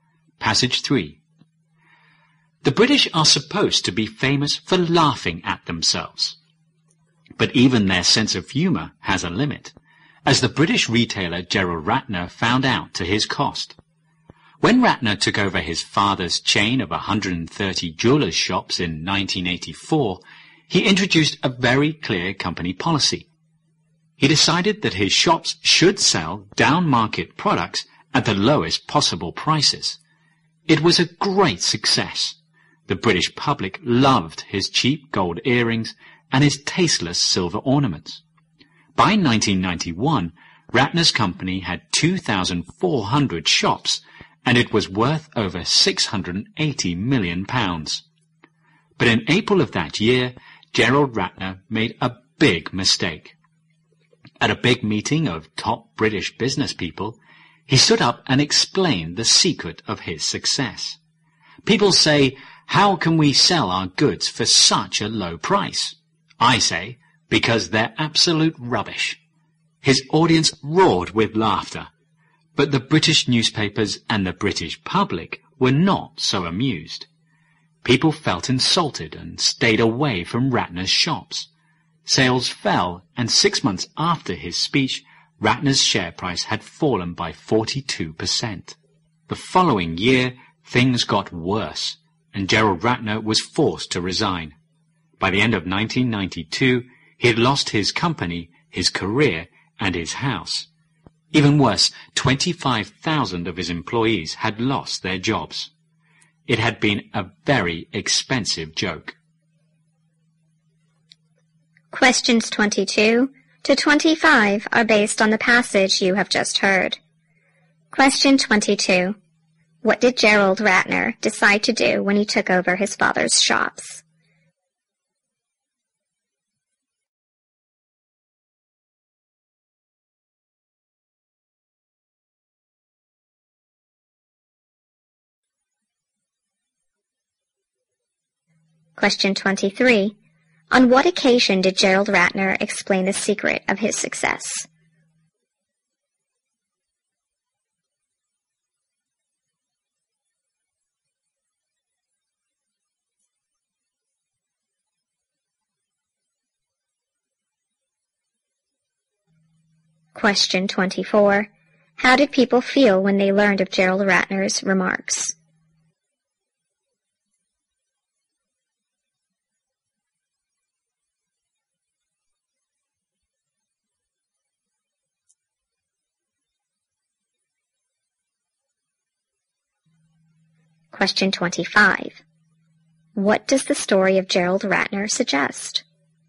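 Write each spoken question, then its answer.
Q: What did Gerald Ratner decide to do when he took over his father's shops?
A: Sell down-market products at the lowest possible prices.

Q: On what occasion did Gerald Ratner explain the secret of his success?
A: At a big meeting of top British business people.

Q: How did people feel when they learned of Gerald Ratner's remarks?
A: Insulted.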